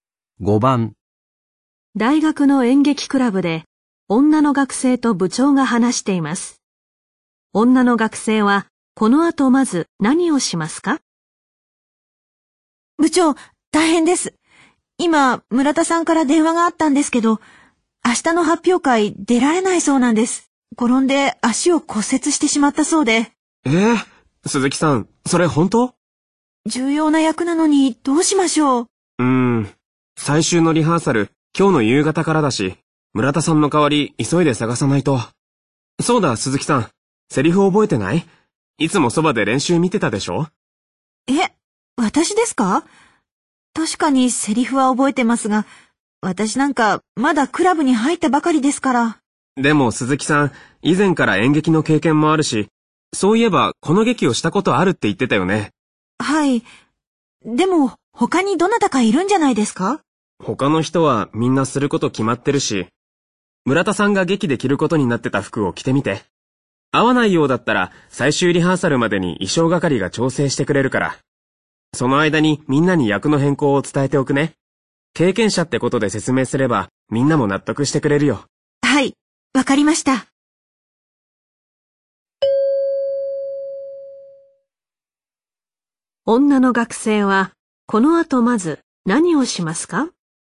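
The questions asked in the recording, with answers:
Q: 女の学生は、この後まず何をしますか?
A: 村田さんが着るはずだった衣装を着てみる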